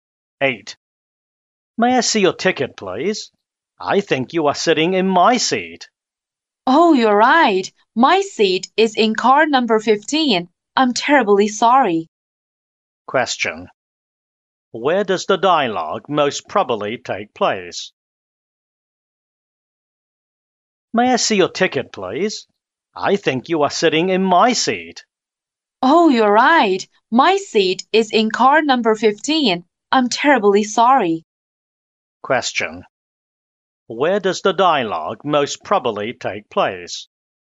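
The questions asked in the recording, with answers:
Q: Where does the dialogue most probably take place?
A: On a train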